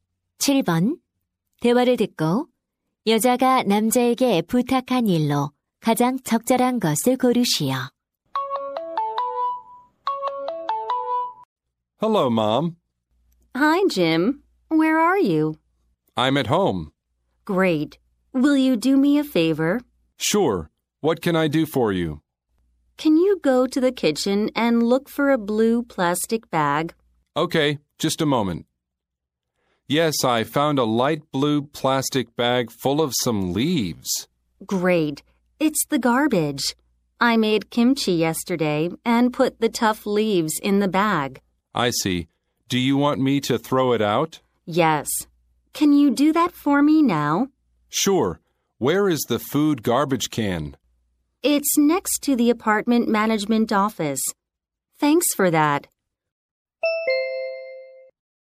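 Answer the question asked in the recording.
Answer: 음식물 쓰레기 버리기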